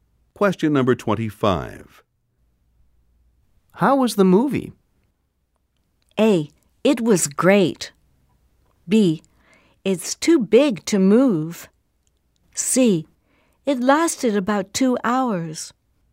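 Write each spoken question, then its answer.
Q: How was the movie?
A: A: It was great.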